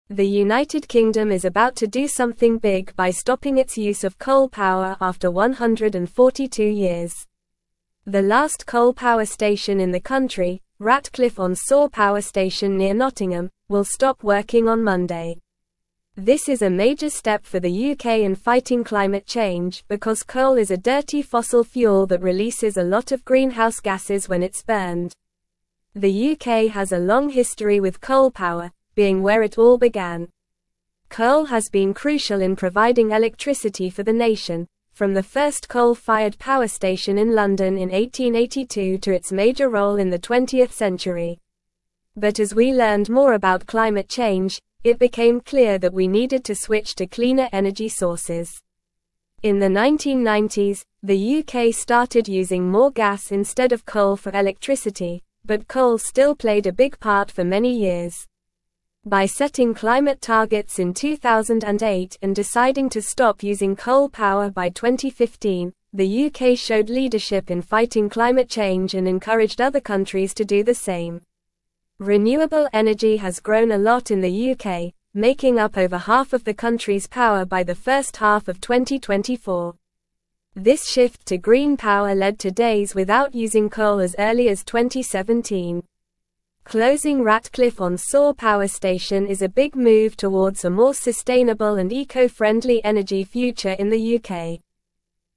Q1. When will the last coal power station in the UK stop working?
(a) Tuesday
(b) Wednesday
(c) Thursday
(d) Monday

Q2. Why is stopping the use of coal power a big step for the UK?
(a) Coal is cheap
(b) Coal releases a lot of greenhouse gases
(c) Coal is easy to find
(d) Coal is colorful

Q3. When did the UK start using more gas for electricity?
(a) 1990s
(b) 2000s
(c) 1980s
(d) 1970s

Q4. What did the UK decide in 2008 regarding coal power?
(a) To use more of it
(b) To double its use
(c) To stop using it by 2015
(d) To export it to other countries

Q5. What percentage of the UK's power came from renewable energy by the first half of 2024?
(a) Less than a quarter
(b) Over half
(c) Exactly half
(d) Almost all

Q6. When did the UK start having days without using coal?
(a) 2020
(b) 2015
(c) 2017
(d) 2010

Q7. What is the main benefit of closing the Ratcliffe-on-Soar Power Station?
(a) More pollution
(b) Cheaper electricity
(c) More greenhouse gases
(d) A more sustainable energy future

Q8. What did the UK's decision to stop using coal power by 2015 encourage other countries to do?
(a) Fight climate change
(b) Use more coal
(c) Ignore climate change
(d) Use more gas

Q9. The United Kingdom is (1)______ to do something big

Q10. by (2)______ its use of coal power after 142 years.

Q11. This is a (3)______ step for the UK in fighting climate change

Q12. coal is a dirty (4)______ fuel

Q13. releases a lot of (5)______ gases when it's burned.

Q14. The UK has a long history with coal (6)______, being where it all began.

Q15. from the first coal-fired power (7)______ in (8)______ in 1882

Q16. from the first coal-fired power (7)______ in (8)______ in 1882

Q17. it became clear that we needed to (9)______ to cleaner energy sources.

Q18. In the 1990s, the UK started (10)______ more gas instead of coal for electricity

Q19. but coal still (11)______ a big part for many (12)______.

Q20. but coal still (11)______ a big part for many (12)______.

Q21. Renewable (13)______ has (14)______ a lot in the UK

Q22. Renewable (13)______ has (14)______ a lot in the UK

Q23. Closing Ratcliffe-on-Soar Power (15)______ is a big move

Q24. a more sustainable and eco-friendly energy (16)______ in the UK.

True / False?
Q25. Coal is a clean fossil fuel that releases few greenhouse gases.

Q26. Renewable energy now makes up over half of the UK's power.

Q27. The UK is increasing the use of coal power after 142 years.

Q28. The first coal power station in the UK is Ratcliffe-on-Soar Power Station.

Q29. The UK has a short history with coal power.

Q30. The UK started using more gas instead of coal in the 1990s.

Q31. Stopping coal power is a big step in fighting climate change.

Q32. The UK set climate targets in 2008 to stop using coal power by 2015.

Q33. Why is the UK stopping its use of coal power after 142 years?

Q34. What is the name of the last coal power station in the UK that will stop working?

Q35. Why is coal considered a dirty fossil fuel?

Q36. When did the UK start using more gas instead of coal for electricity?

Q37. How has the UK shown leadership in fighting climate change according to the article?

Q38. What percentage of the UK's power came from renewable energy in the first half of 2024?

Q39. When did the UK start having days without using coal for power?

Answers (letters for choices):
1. d
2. b
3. a
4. c
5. b
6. c
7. d
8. a
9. about
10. stopping
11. major
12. fossil
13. greenhouse
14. power
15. station
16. London
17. switch
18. using
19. played
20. years
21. energy
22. grown
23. Station
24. future
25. False
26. True
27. False
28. False
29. False
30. True
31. True
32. True
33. The UK is stopping its use of coal power to fight climate change because coal releases a lot of greenhouse gases when burned.
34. The last coal power station in the UK that will stop working is Ratcliffe-on-Soar Power Station near Nottingham.
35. Coal is considered a dirty fossil fuel because it releases a lot of greenhouse gases, which contribute to climate change, when it is burned.
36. In the 1990s, the UK started using more gas instead of coal for electricity.
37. The UK has shown leadership in fighting climate change by setting climate targets in 2008 and deciding to stop using coal power by 2015, which encouraged other countries to do the same.
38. By the first half of 2024, over half of the UK's power came from renewable energy sources.
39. The UK started having days without using coal for power as early as 2017.

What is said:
The United Kingdom is about to do something big by stopping its use of coal power after 142 years. The last coal power station in the country, Ratcliffe-on-Soar Power Station near Nottingham, will stop working on Monday. This is a major step for the UK in fighting climate change because coal is a dirty fossil fuel that releases a lot of greenhouse gases when it's burned.
The UK has a long history with coal power, being where it all began. Coal has been crucial in providing electricity for the nation, from the first coal-fired power station in London in 1882 to its major role in the twentieth century. But as we learned more about climate change, it became clear that we needed to switch to cleaner energy sources.
In the 1990s, the UK started using more gas instead of coal for electricity, but coal still played a big part for many years. By setting climate targets in 2008 and deciding to stop using coal power by 2015, the UK showed leadership in fighting climate change and encouraged other countries to do the same.
Renewable energy has grown a lot in the UK, making up over half of the country's power by the first half of 2024. This shift to green power led to days without using coal as early as 2017. Closing Ratcliffe-on-Soar Power Station is a big move towards a more sustainable and eco-friendly energy future in the UK.

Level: Level 3